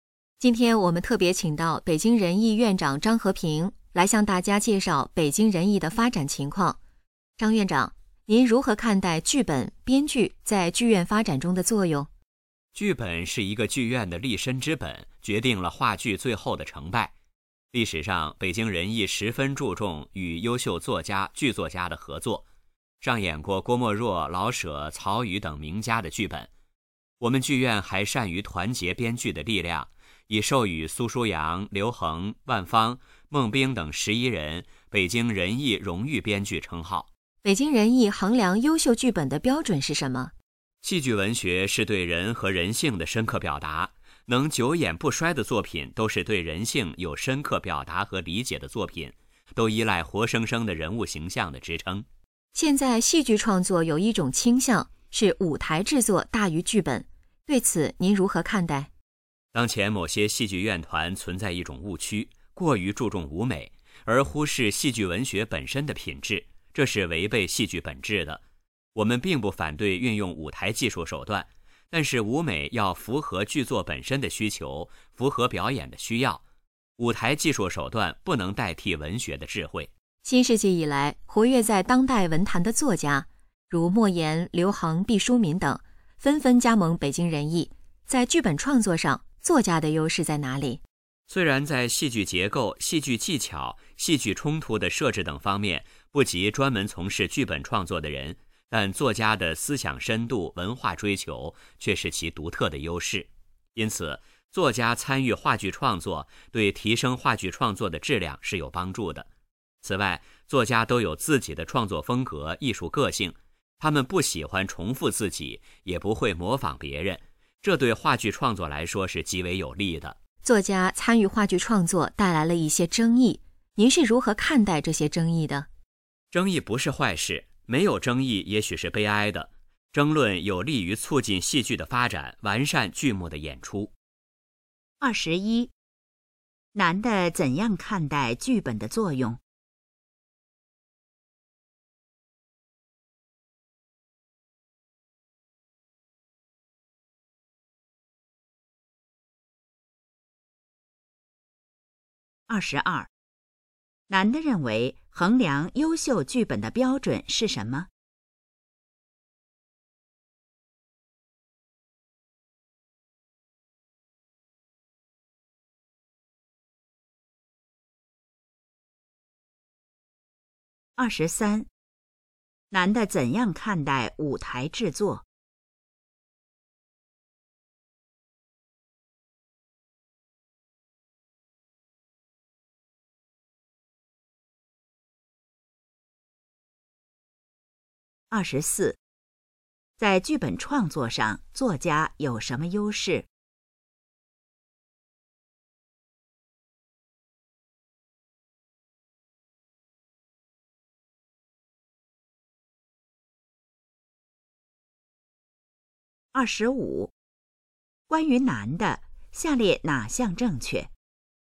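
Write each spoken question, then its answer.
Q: 男的怎样看待剧本的作用?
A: 剧本是剧院的立身之本,决定话剧成败

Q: 男的认为衡量优秀剧本的标准是什么?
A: 对人和人性有深刻表达

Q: 男的怎样看待舞台制作?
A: 舞美要符合剧作需求,不能代替文学

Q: 在剧本创作上,作家有什么优势?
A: 思想深度和文化追求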